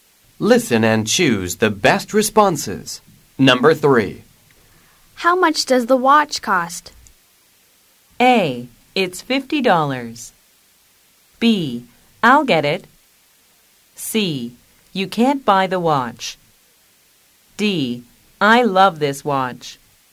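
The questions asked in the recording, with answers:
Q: How much does the watch cost?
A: A: It's $50.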